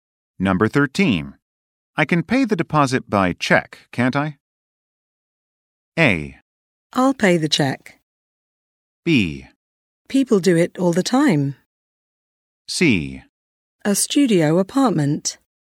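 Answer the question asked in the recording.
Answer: B: People do it all the time.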